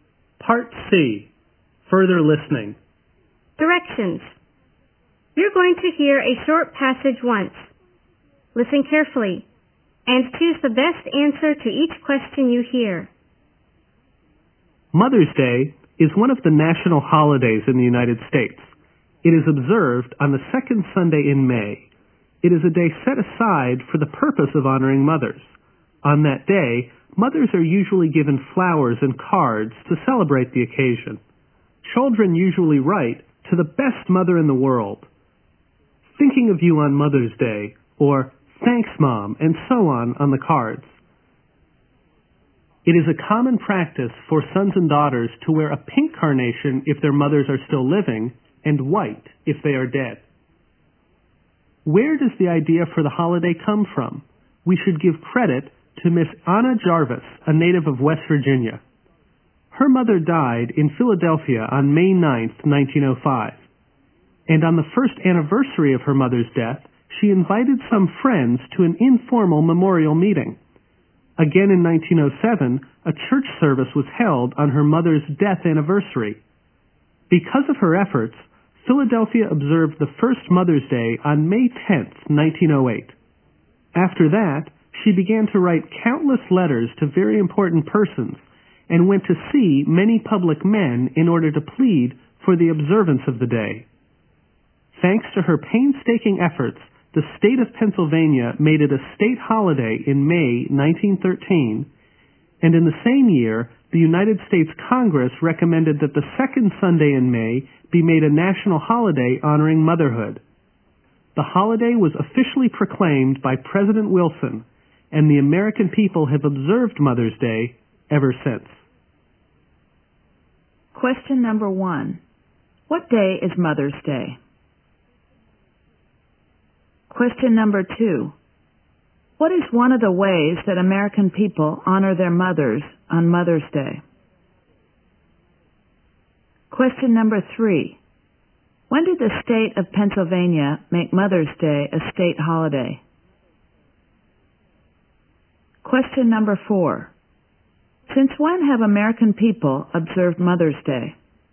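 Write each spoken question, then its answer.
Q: What day is Mother's Day?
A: The second Sunday in May

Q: What is one of the ways that American people honor their mothers on Mother's Day?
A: Giving them flowers and cards

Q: When did the state of Pennsylvania make Mother's Day a state holiday?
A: In May 1913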